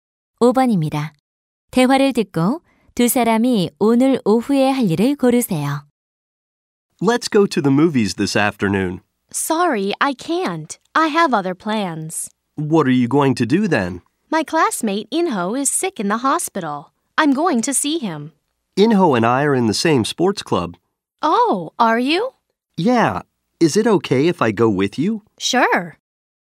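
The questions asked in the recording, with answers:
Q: 대화를 듣고 두 사람이 오늘 오후에 할 일을 고르세요.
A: 병원에 있는 인호 문병 가기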